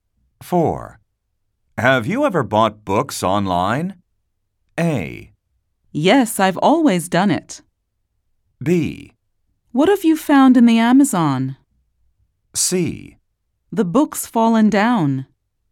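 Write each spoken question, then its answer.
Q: Have you ever bought books online?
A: A: Yes, I've always done it.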